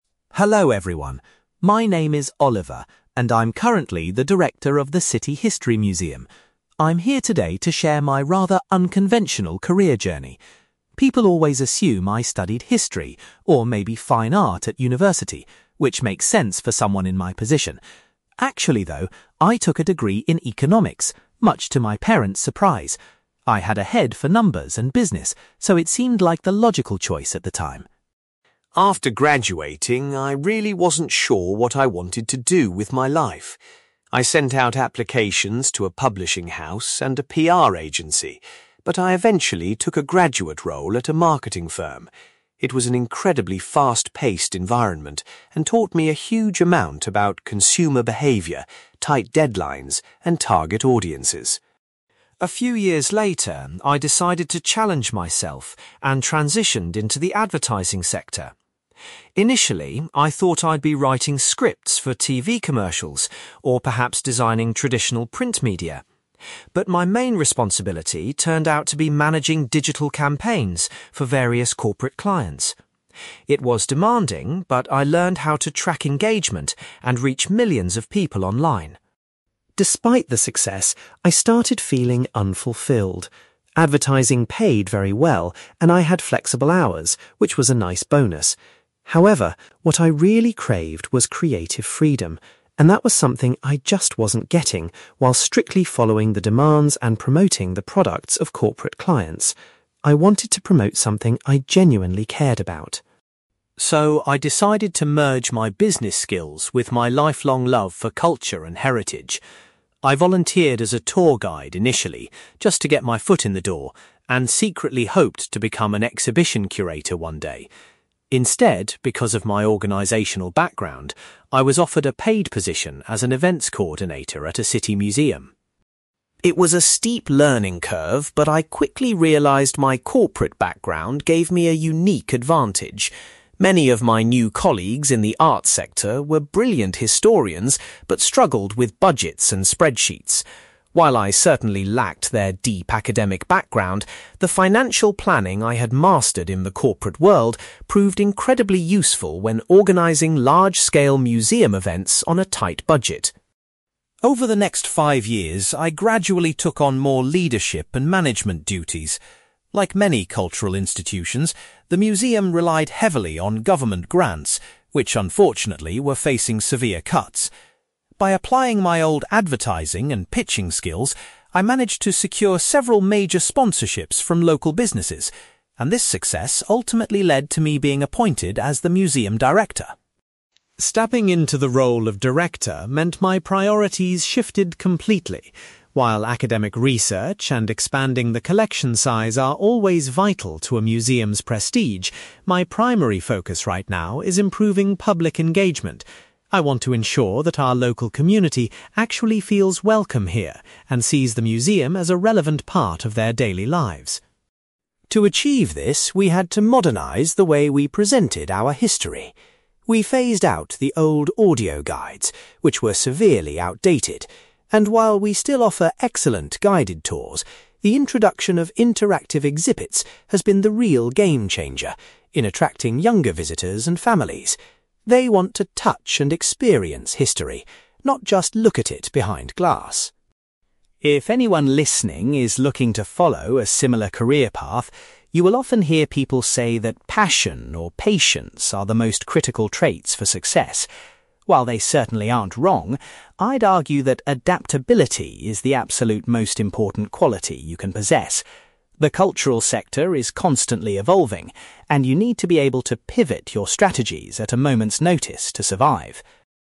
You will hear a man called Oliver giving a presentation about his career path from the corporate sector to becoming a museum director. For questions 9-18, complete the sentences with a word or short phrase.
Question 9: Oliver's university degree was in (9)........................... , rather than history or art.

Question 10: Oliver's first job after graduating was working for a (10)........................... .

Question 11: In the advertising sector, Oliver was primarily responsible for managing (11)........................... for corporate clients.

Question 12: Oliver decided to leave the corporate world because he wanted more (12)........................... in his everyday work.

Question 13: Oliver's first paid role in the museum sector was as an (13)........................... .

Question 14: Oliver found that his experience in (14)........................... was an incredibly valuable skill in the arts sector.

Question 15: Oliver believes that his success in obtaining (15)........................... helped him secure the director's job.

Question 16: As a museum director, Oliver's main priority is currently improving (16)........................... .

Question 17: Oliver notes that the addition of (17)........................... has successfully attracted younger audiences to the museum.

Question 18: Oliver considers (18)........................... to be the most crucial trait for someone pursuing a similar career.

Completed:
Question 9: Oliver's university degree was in economics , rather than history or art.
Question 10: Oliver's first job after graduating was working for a marketing firm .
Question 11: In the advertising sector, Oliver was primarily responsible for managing digital campaigns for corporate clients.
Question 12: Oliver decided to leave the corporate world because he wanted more creative freedom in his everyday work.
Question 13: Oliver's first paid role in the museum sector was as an events coordinator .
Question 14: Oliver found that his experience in financial planning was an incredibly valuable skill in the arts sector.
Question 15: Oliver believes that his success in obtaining sponsorships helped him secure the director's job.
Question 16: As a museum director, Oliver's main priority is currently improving public engagement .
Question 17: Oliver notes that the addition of interactive exhibits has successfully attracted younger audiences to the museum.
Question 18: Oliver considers adaptability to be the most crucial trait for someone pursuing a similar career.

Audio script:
Oliver: Hello everyone. My name is Oliver, and I'm currently the director of the City History Museum. I'm here today to share my rather unconventional career journey. People always assume I studied history or maybe fine art at university, which makes sense for someone in my position. Actually, though, I took a degree in economics, much to my parents' surprise. I had a head for numbers and business, so it seemed like the logical choice at the time.
After graduating, I really wasn't sure what I wanted to do with my life. I sent out applications to a publishing house and a PR agency, but I eventually took a graduate role at a marketing firm. It was an incredibly fast-paced environment and taught me a huge amount about consumer behaviour, tight deadlines, and target audiences.
A few years later, I decided to challenge myself and transitioned into the advertising sector. Initially, I thought I'd be writing scripts for TV commercials or perhaps designing traditional print media, but my main responsibility turned out to be managing digital campaigns for various corporate clients. It was demanding, but I learned how to track engagement and reach millions of people online.
Despite the success, I started feeling unfulfilled. Advertising paid very well, and I had flexible hours, which was a nice bonus. However, what I really craved was creative freedom, and that was something I just wasn't getting while strictly following the demands and promoting the products of corporate clients. I wanted to promote something I genuinely cared about.
So, I decided to merge my business skills with my lifelong love for culture and heritage. I volunteered as a tour guide initially, just to get my foot in the door, and secretly hoped to become an exhibition curator one day. Instead, because of my organizational background, I was offered a paid position as an events coordinator at a city museum.
It was a steep learning curve, but I quickly realized my corporate background gave me a unique advantage. Many of my new colleagues in the arts sector were brilliant historians but struggled with budgets and spreadsheets. While I certainly lacked their deep academic background, the financial planning I had mastered in the corporate world proved incredibly useful when organizing large-scale museum events on a tight budget.
Over the next five years, I gradually took on more leadership and management duties. Like many cultural institutions, the museum relied heavily on government grants, which unfortunately were facing severe cuts. By applying my old advertising and pitching skills, I managed to secure several major sponsorships from local businesses, and this success ultimately led to me being appointed as the museum director.
Stepping into the role of director meant my priorities shifted completely. While academic research and expanding the collection size are always vital to a museum's prestige, my primary focus right now is improving public engagement. I want to ensure that our local community actually feels welcome here and sees the museum as a relevant part of their daily lives.
To achieve this, we had to modernize the way we presented our history. We phased out the old audio guides, which were severely outdated, and while we still offer excellent guided tours, the introduction of interactive exhibits has been the real game-changer in attracting younger visitors and families. They want to touch and experience history, not just look at it behind glass.
If anyone listening is looking to follow a similar career path, you will often hear people say that passion or patience are the most critical traits for success. While they certainly aren't wrong, I'd argue that adaptability is the absolute most important quality you can possess. The cultural sector is constantly evolving, and you need to be able to pivot your strategies at a moment's notice to survive.

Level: B2